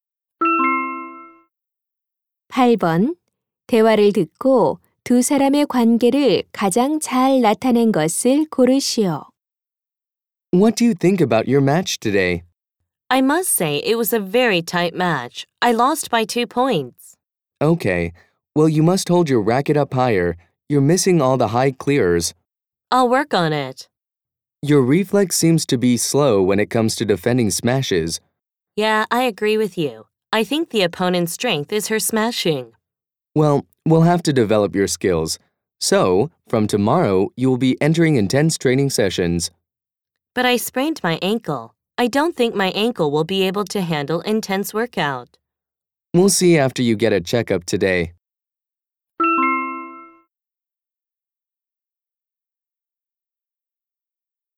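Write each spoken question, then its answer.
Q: 대화를 듣고 두 사람의 관계를 가장 잘 나타낸 것을 고르시오.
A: 배드민턴 코치와 선수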